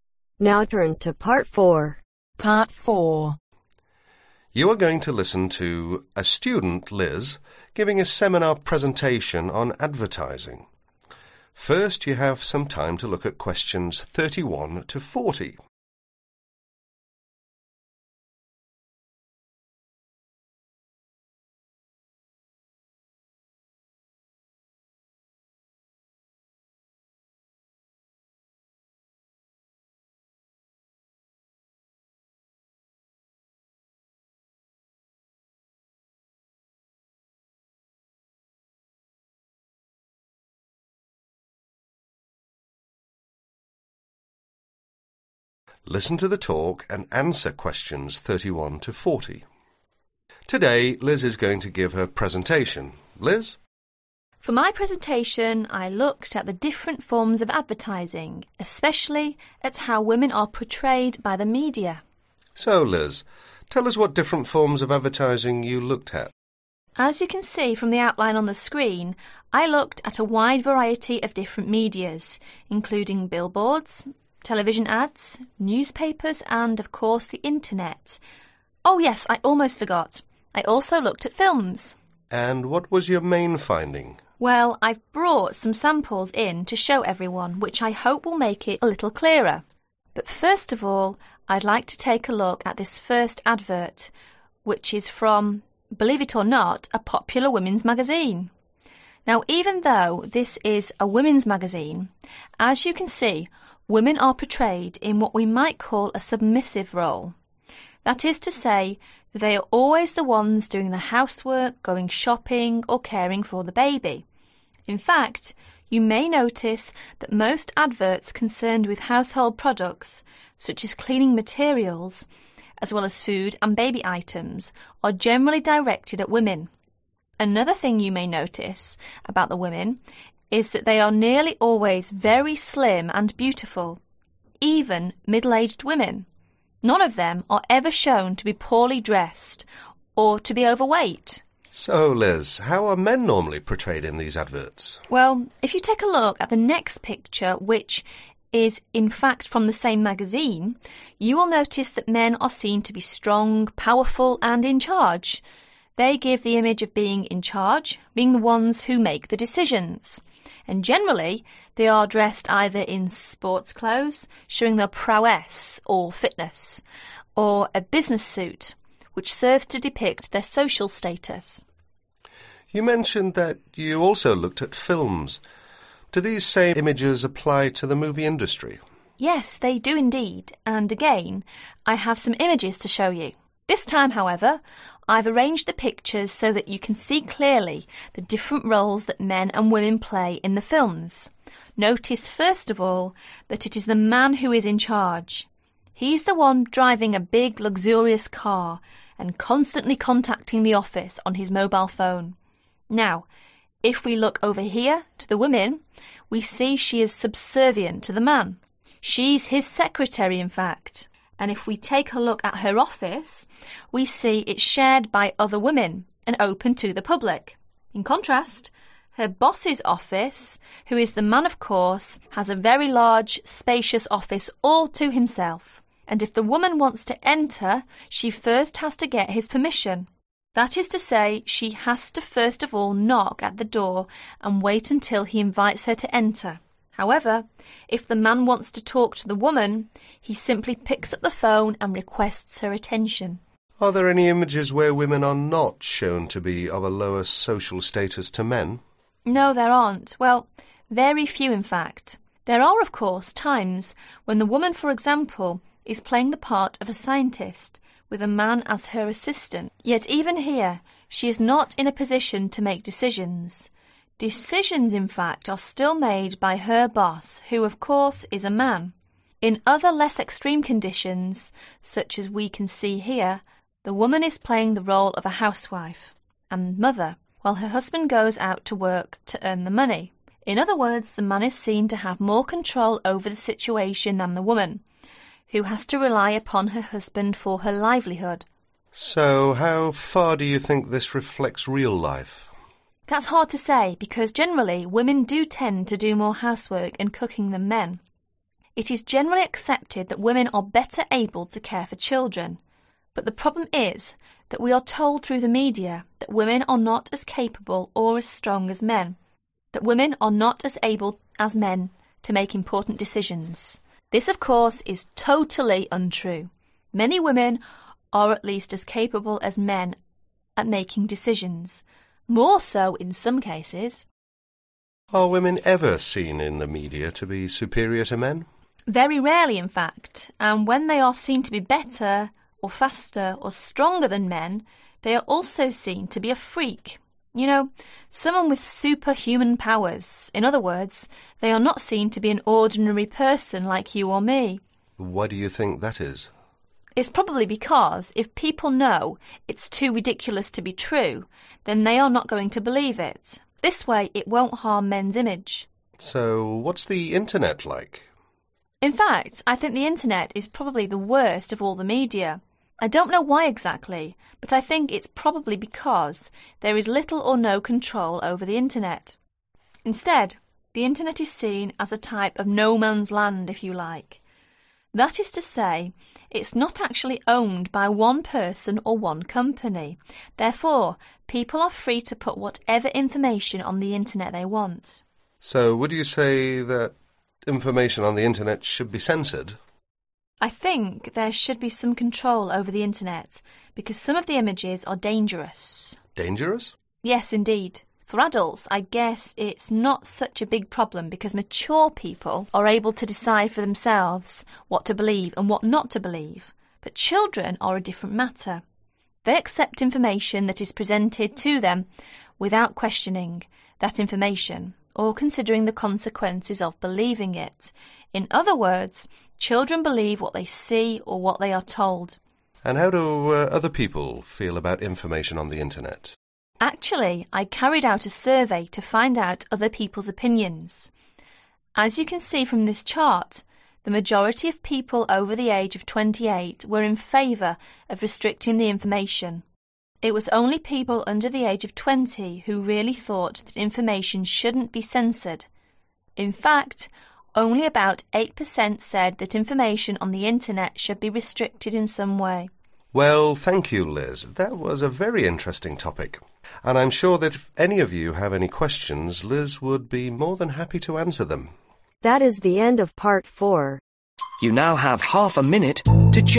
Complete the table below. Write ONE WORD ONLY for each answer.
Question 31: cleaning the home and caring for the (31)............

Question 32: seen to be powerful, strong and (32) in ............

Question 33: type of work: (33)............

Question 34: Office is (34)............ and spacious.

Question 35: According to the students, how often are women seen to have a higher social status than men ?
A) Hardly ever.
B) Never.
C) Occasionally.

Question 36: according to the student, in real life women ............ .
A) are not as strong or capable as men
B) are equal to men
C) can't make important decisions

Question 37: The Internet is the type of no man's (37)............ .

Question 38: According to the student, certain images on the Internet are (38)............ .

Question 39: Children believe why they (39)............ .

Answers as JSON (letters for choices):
{"31": "Baby", "32": "Charge", "33": "Secretary", "34": "Large", "35": "A", "36": "B", "37": "Land", "38": "Dangerous", "39": "See"}